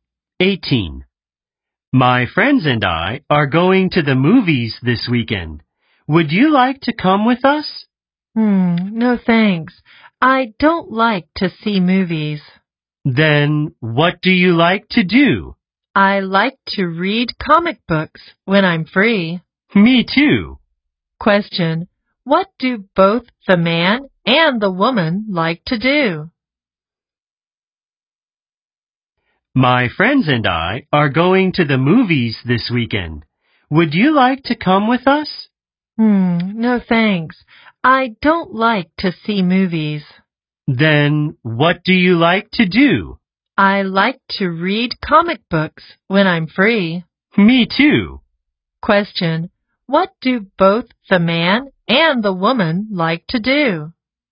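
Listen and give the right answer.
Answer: read comic books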